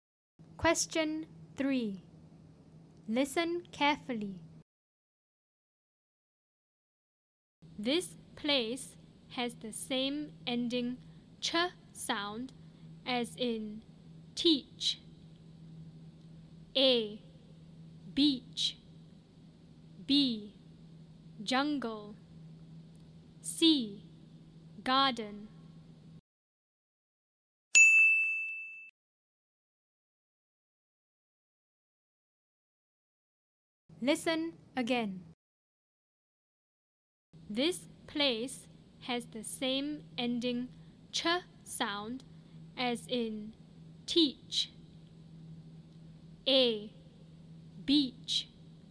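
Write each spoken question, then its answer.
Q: This place has the same ending ch sound as in teach.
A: A: Beach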